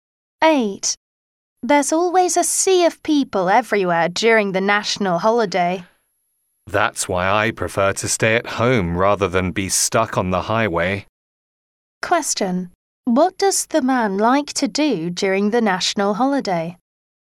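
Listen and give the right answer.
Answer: Stay at home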